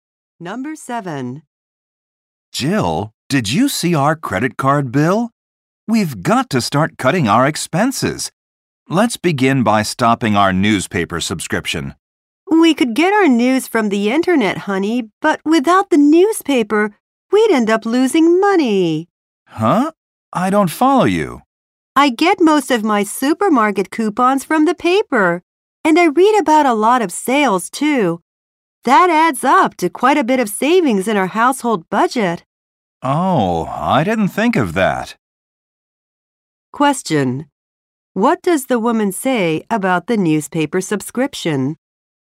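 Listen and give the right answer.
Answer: It saves them money through coupons and sales information.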